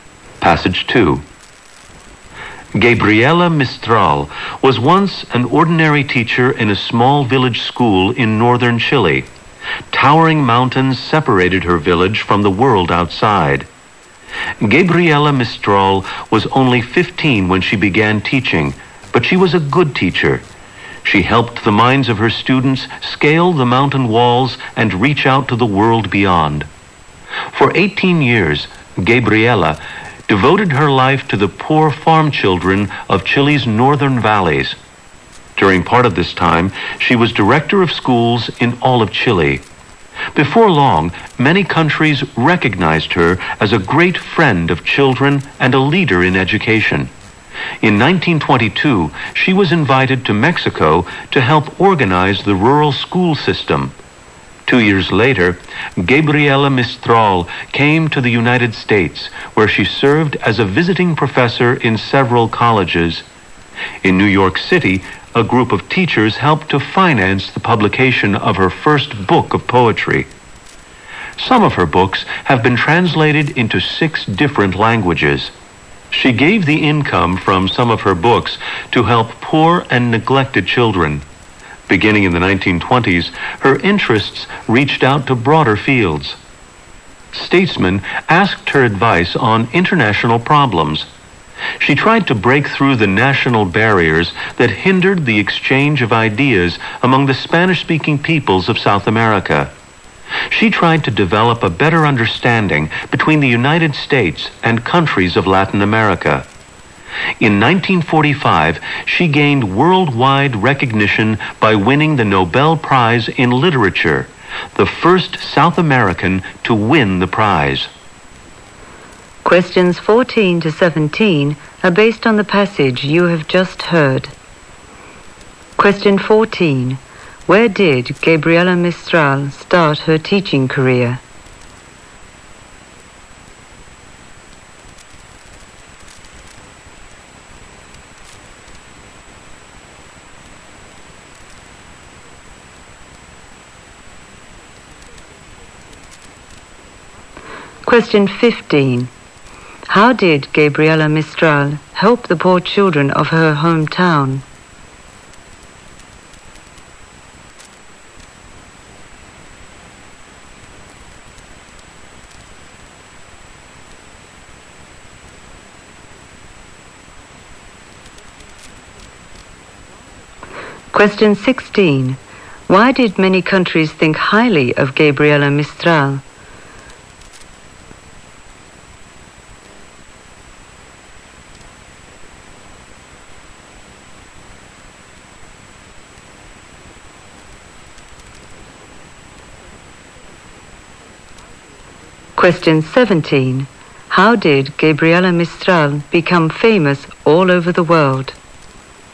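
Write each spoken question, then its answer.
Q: Where did Gabriela Mistral start her teaching career?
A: In a small village school in northern Chile.

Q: Why did many countries think highly of Gabriela Mistral?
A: She was a great friend of children and a leader in education.

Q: How did Gabriela Mistral become famous all over the world?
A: By winning the Nobel Prize in Literature in 1945.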